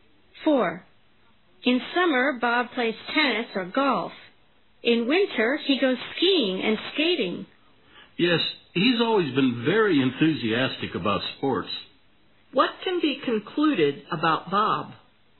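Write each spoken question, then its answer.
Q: What can be concluded about Bob?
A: He is very enthusiastic about sports.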